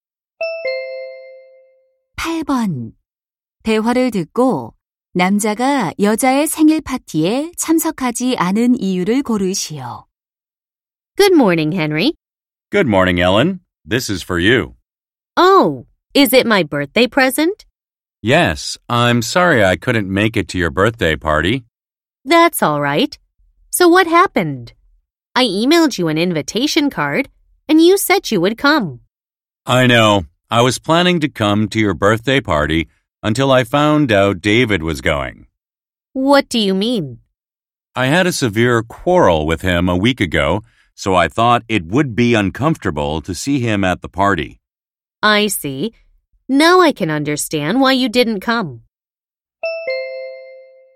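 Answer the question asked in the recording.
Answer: 파티에 오는 David와 크게 다퉈서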